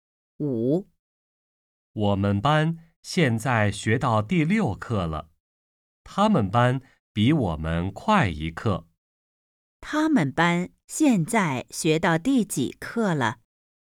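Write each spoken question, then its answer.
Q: 他们班现在学到第几课了?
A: 第7课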